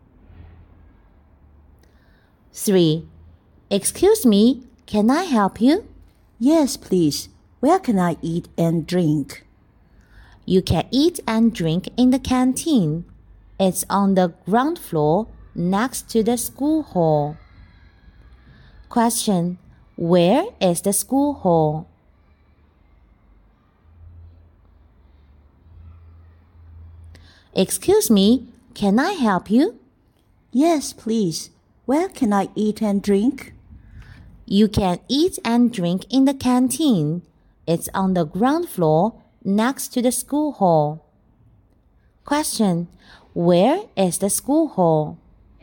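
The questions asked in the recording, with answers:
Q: where is the school hall?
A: On the ground floor, next to the canteen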